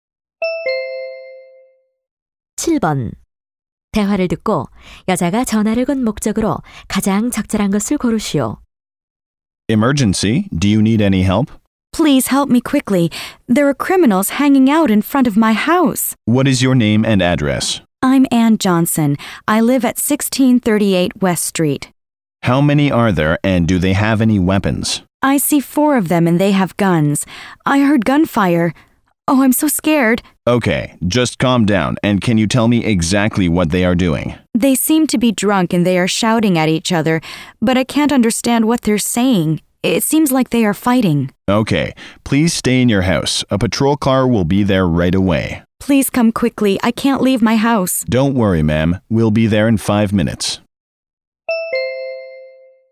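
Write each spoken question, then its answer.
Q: 대화를 듣고 여자가 전화를 건 목적으로 가장 적절한 것을 고르시오.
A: 집 앞의 범죄자들을 신고하려고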